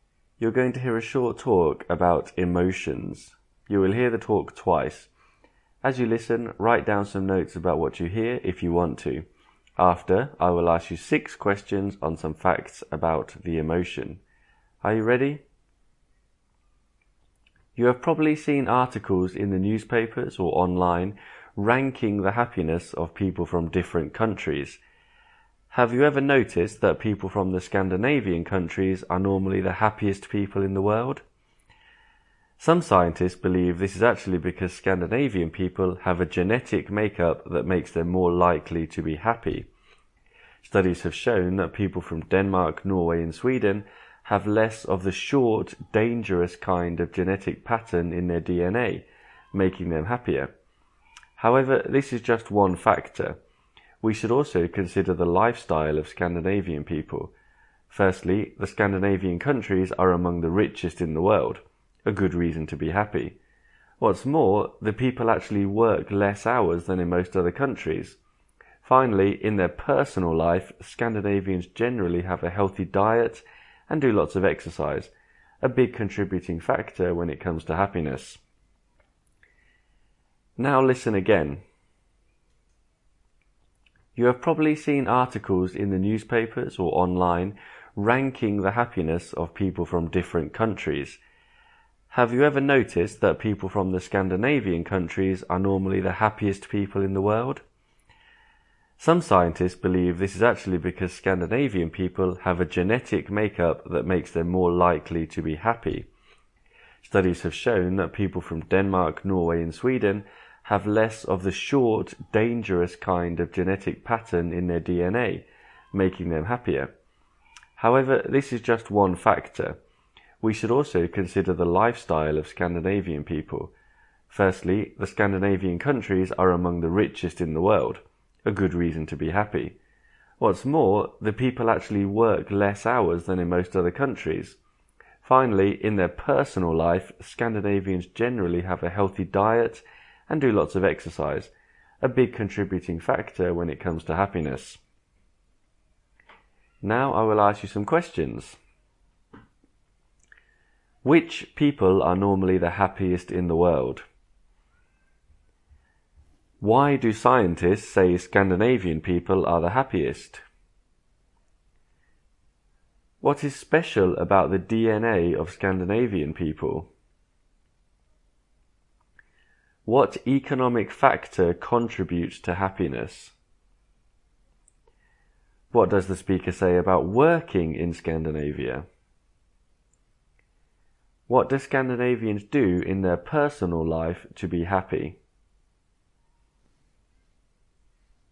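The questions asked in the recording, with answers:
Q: Which people are normally the happiest in the world?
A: People from the Scandinavian countries

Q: Why do scientists say Scandinavian people are the happiest?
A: They have a genetic makeup that makes them more likely to be happy

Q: What is special about the DNA of Scandinavian people?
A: It has less of the short, dangerous kind of genetic pattern

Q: What economic factor contributes to happiness?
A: The Scandinavian countries are among the richest in the world

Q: What does the speaker say about working in Scandinavia?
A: People work fewer hours than in most other countries

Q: What do Scandinavians do in their personal life to be happy?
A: Eat a healthy diet and do lots of exercise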